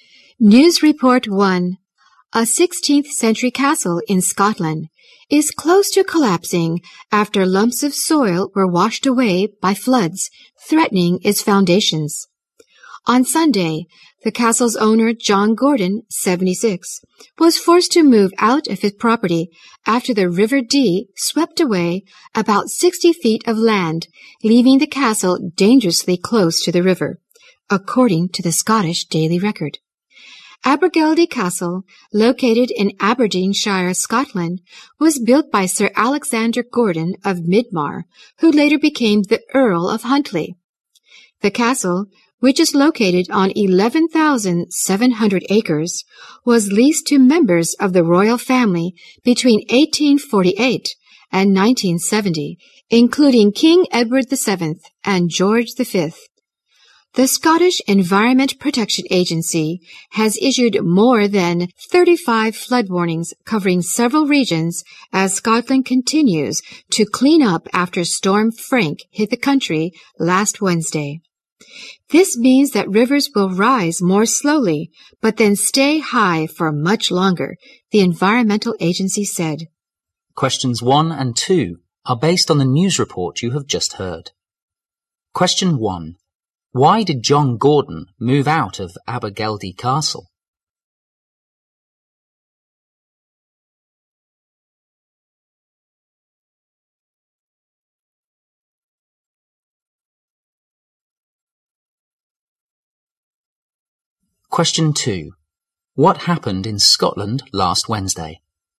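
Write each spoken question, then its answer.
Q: Why did John Gordon move out of Abergeldy Castle?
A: The river swept away land, leaving the castle dangerously close to collapse

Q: What happened in Scotland last Wednesday?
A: Storm Frank hit the country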